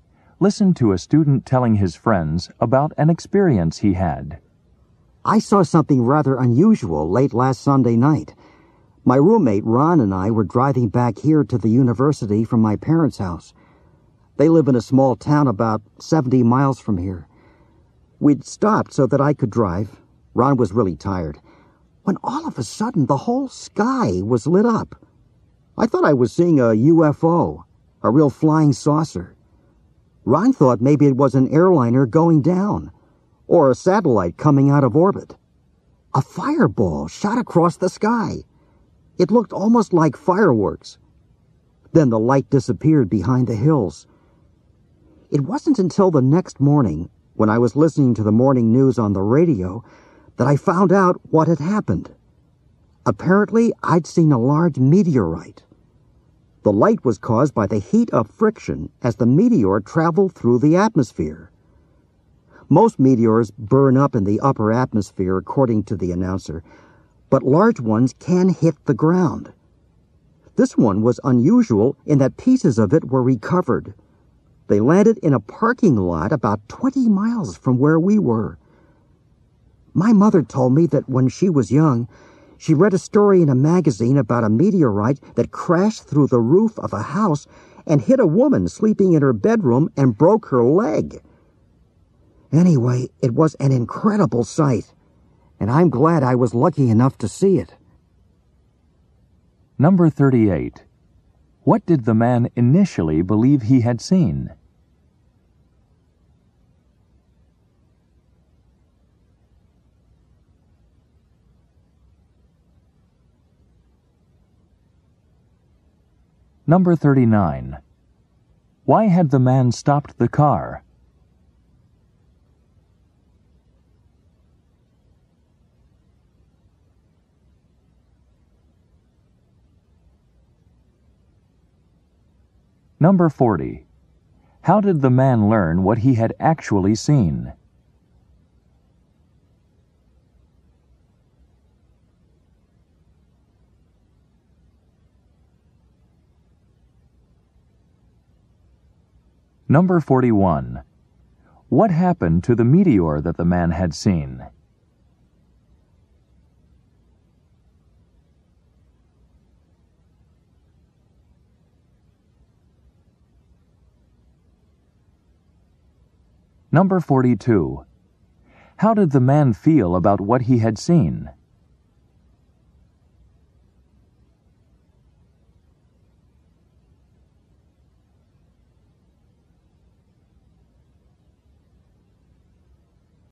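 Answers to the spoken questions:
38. A UFO (a flying saucer)
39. So that he could drive because Ron was tired
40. From the morning news on the radio
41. Pieces of it landed in a parking lot and were recovered
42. Glad and lucky to have seen it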